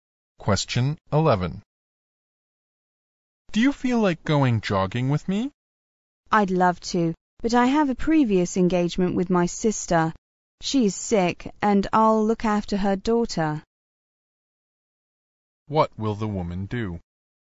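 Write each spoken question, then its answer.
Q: What will the woman do?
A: Look after her sister's daughter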